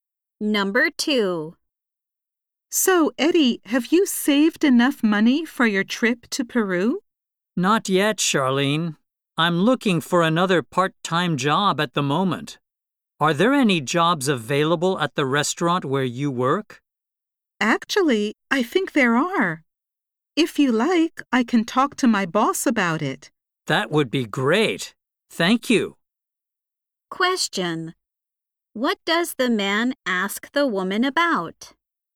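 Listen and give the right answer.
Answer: Jobs available at the restaurant where she works.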